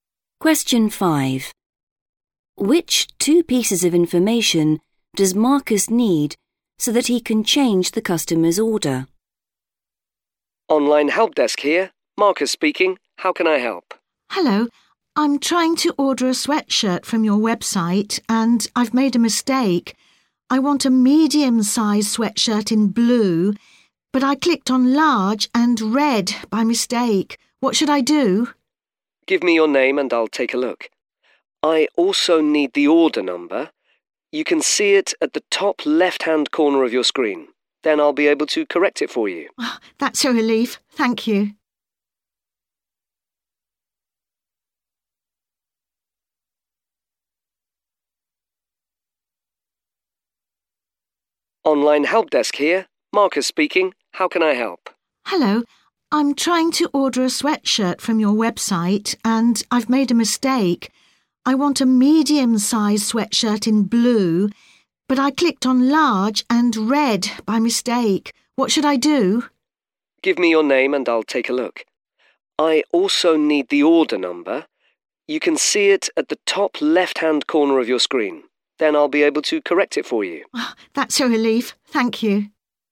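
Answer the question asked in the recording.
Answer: name and order number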